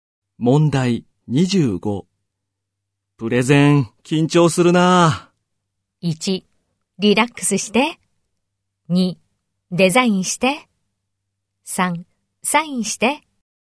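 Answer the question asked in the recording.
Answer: 1: リラックスして。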